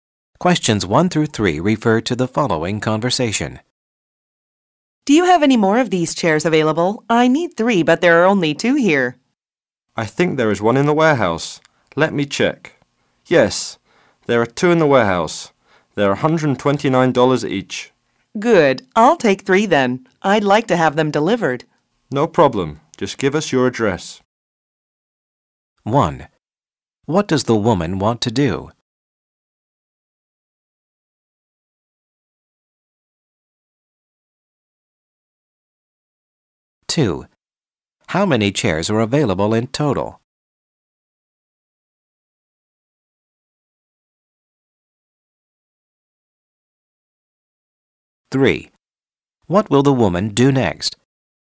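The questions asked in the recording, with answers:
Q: What does the woman want to do?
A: Buy three chairs and have them delivered

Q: What will the woman do next?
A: Give her address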